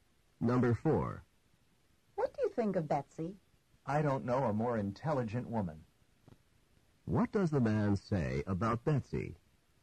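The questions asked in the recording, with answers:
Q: What does the man say about Betsy?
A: Betsy is extremely intelligent.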